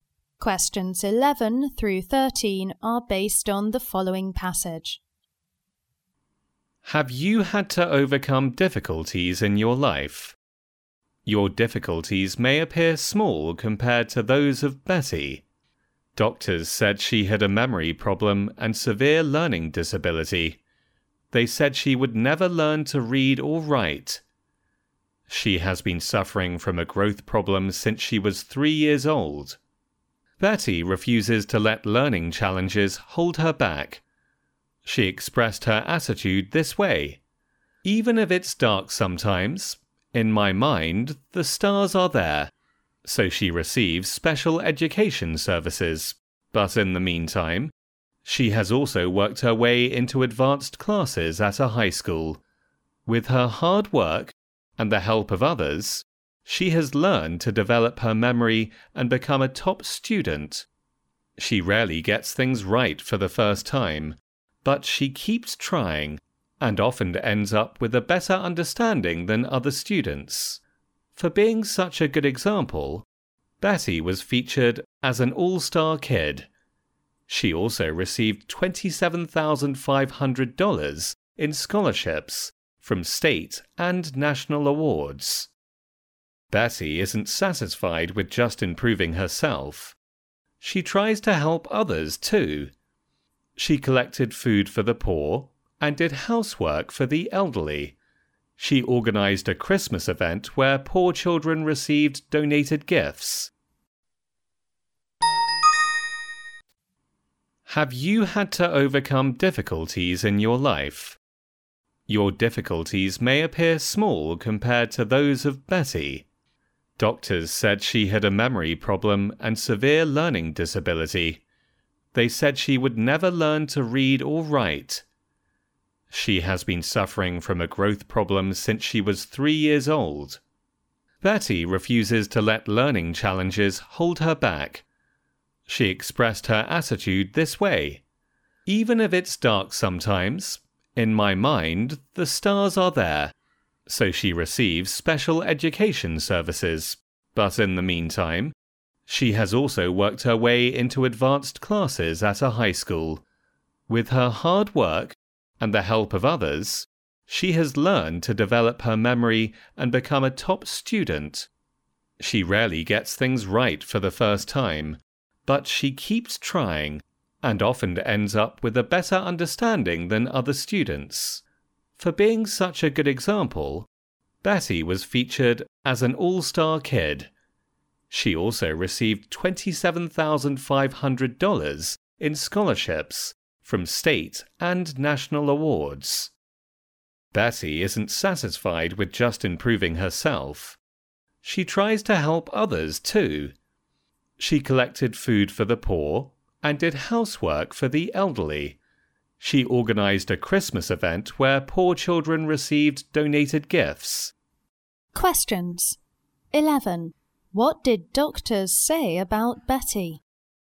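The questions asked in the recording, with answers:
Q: What did doctors say about Betty?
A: She had a memory problem and a severe learning disability and would never learn to read or write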